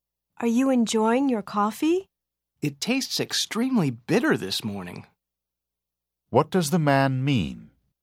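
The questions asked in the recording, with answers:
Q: What does the man mean?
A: The coffee tastes very bitter.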